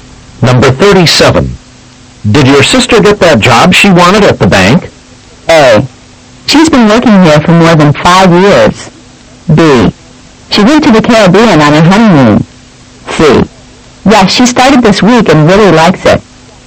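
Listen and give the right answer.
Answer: C: Yes, she started this week and really likes it.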